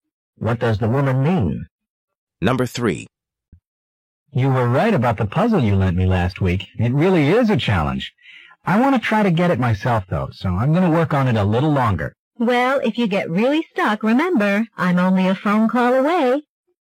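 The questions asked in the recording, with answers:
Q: What does the woman mean?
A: She can help with the puzzle if he calls her.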